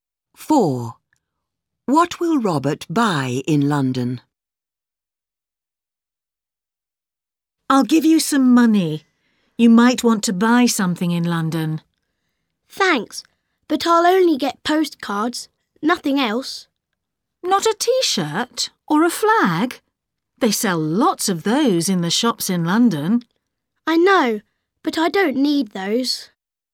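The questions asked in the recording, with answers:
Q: What will Robert buy in London?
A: Postcards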